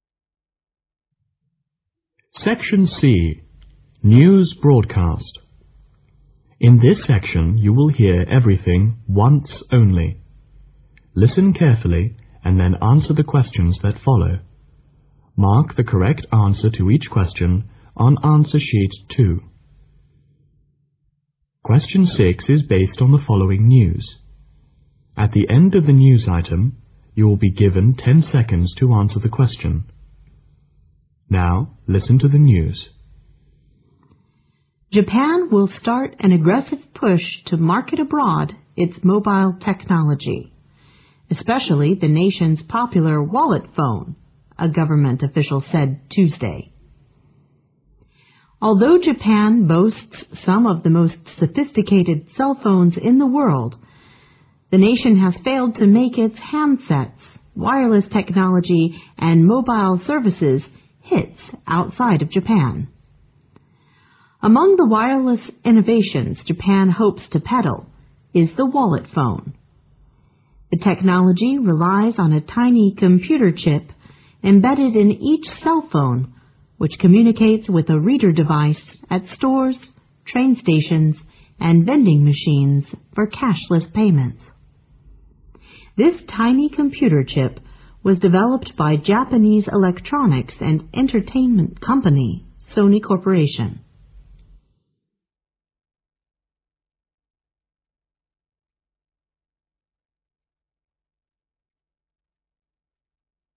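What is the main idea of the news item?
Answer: Japan will market its wallet phone abroad.

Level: 英语专业八级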